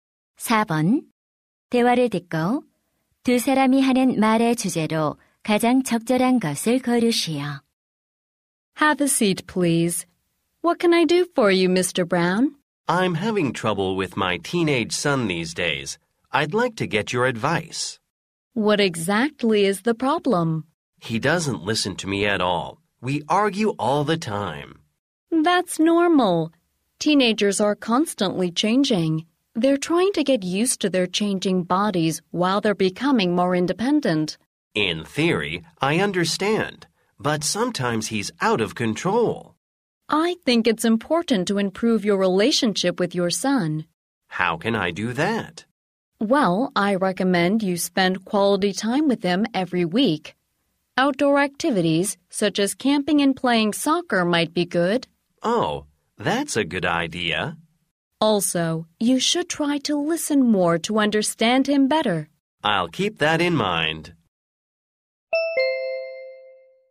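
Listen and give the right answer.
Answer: 십대 자녀와의 관계 개선 방법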